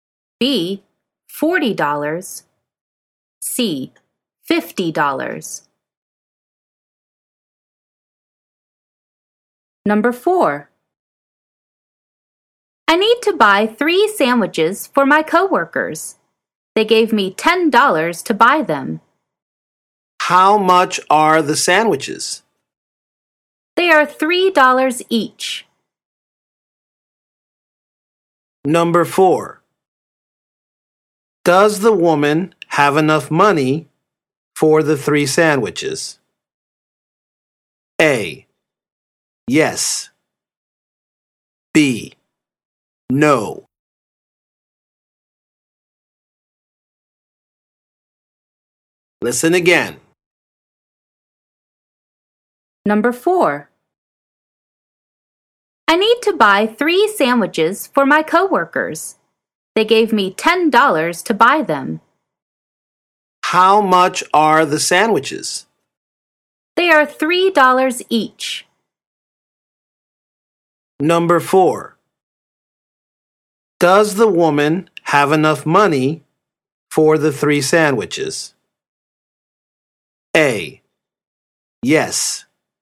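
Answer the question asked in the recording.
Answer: A: Yes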